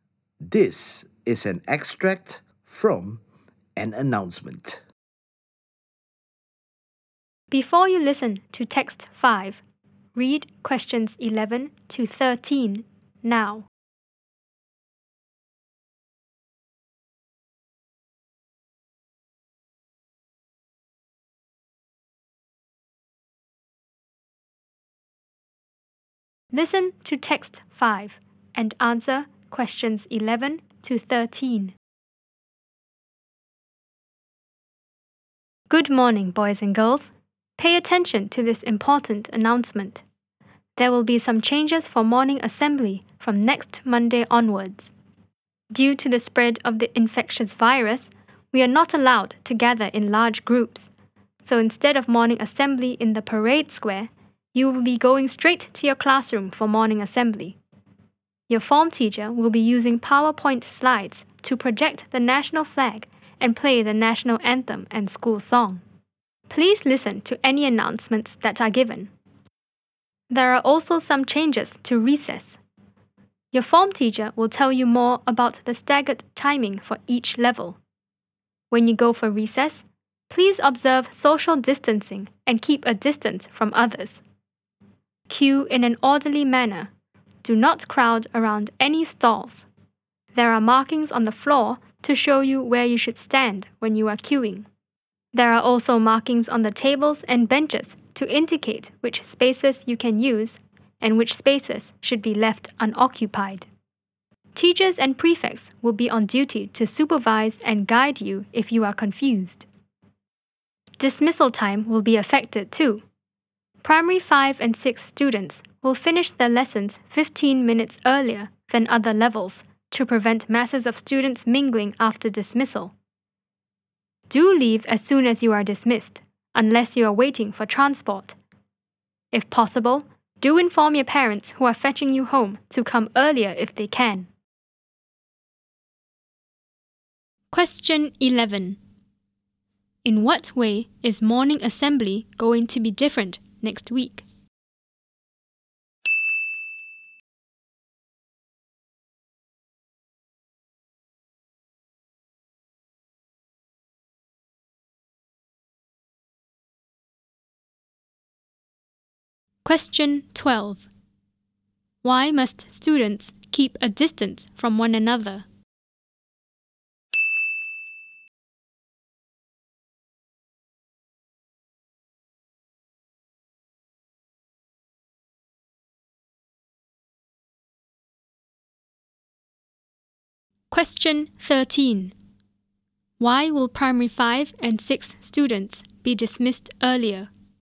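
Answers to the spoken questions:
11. Students will go straight to their classrooms for assembly instead of the parade square
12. Because of the spread of the infectious virus
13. To prevent masses of students mingling after dismissal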